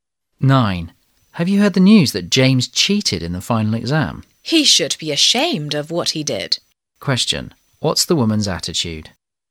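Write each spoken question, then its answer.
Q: Question: What's the woman's attitude?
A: Disapproving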